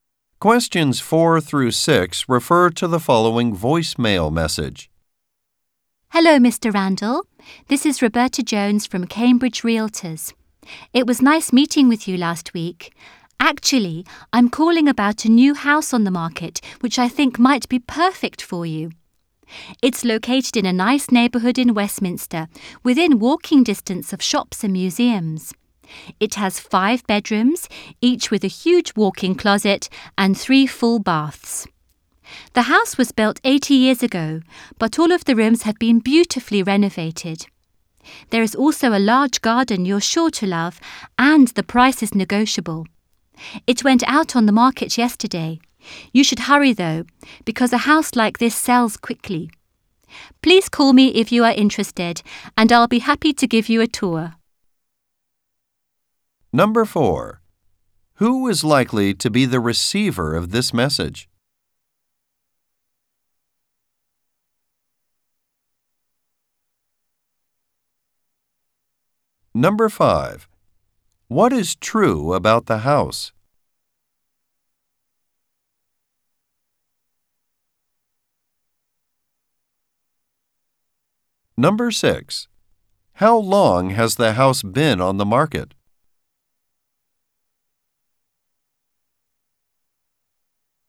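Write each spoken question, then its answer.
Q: Who is likely to be the receiver of this message?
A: A prospective home buyer (Mr. Randall, a client of the realtor)

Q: How long has the house been on the market?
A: Since yesterday (one day)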